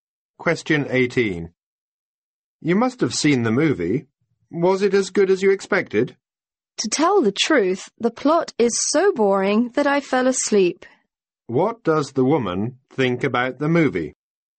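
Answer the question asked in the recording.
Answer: It was boring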